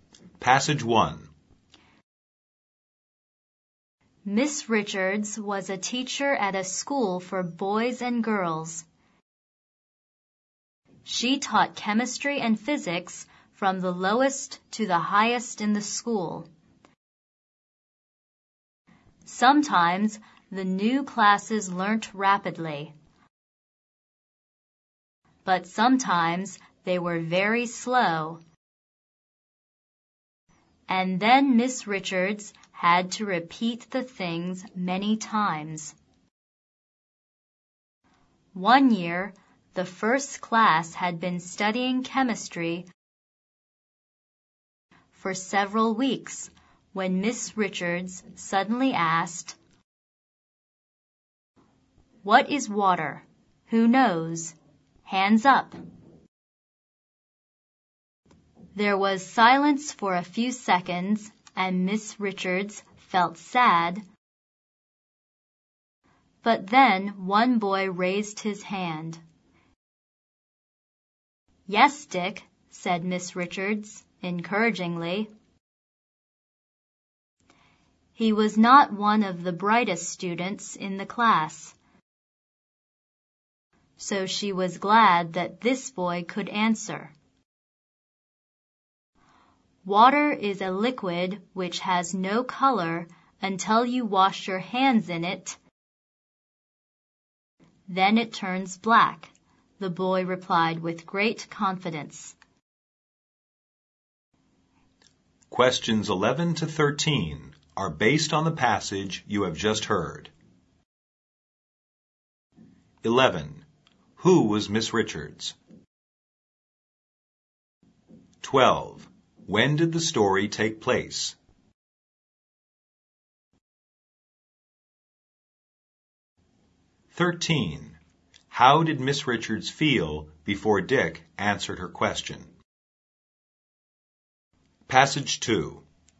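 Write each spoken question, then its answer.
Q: Who was Miss Richards?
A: A chemistry and physics teacher at a school for boys and girls

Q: How did Miss Richards feel before Dick answered her question?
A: Sad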